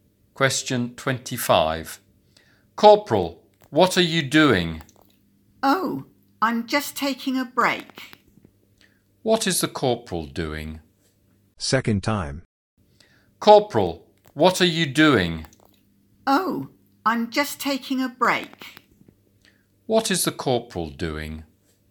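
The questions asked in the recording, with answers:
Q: What is the corporal doing?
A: Taking a break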